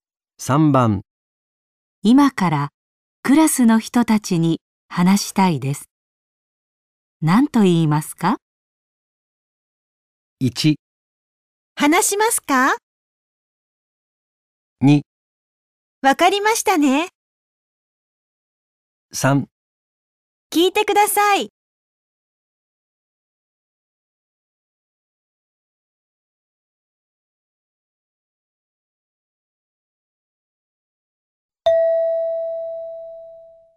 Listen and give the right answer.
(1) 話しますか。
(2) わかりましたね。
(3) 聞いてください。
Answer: (3) 聞いてください。

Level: N5 Listening · Test 3